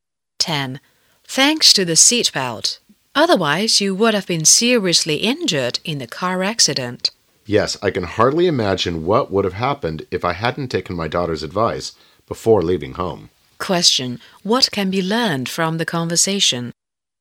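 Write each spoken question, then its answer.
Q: What can be learned from the conversation?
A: The woman wore her seatbelt on her daughter's advice and so escaped serious injury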